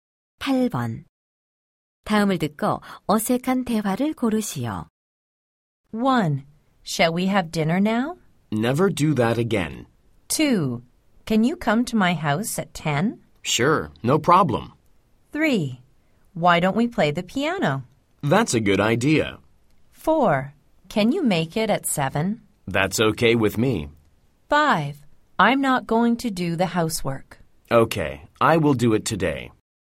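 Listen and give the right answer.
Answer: 1: Shall we have dinner now? - Never do that again.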